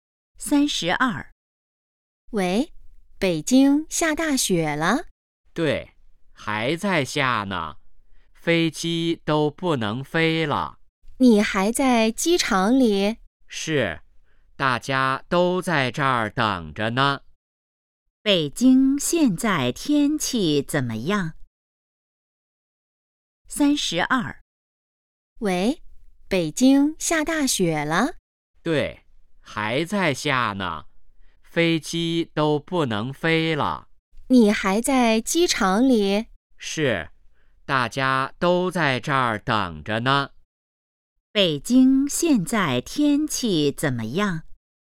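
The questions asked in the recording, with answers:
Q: 北京现在天气怎么样?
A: 下大雪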